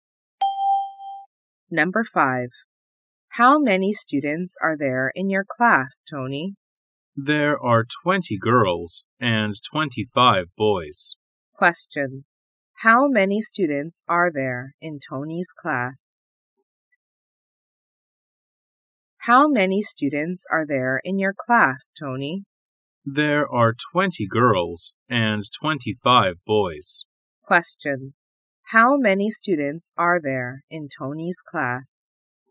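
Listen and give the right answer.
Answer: 45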